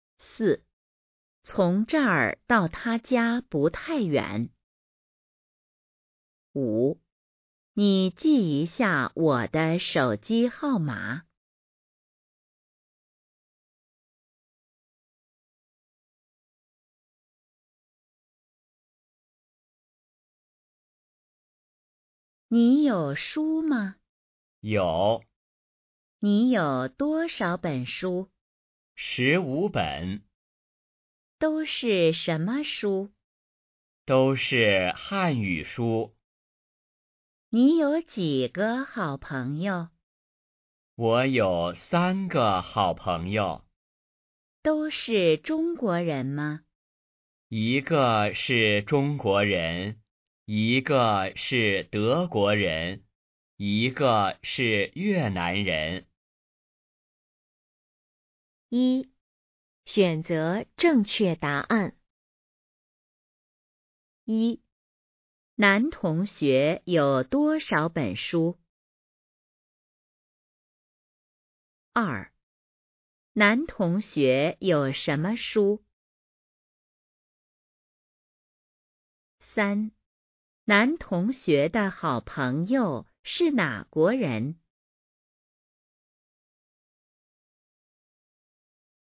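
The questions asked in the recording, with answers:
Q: 男同学有多少本书?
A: 十五本

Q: 男同学有什么书?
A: 汉语书

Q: 男同学的好朋友是哪国人?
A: 一个是中国人,一个是德国人,一个是越南人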